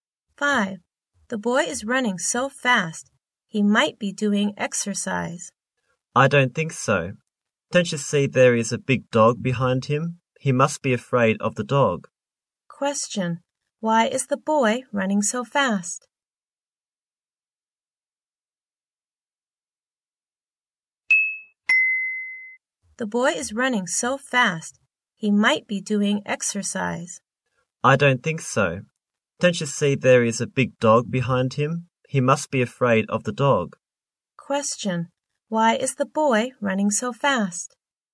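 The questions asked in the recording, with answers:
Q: Why is the boy running so fast?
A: He is afraid of the dog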